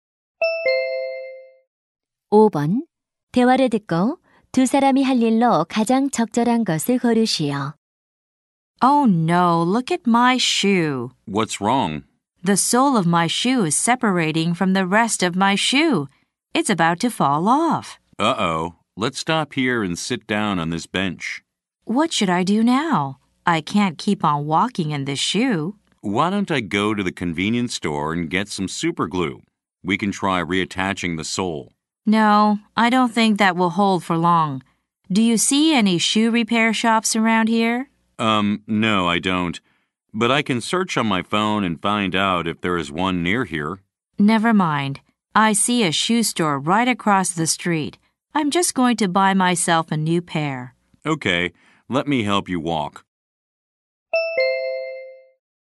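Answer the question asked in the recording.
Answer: 길 건너 신발 가게에 가서 새 신발 사기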